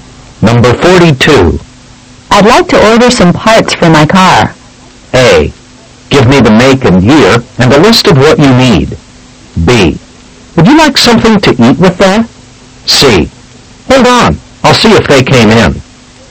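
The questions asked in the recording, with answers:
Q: I'd like to order some parts for my car.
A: A: Give me the make and year and a list of what you need.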